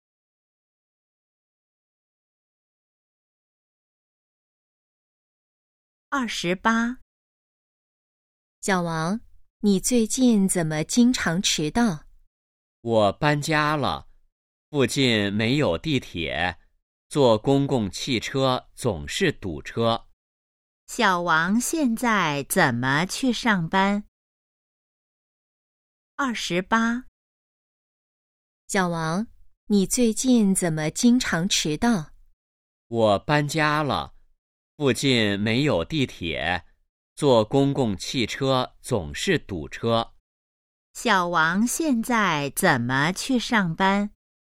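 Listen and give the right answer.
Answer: 坐公共汽车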